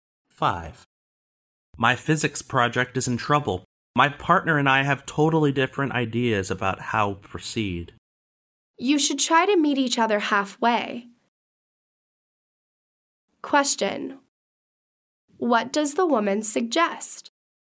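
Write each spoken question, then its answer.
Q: What does the woman suggest?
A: That he and his partner compromise.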